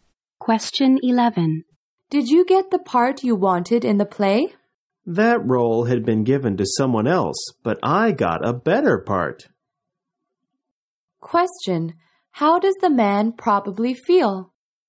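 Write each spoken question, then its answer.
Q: How does the man probably feel?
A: Pleased; he got a better part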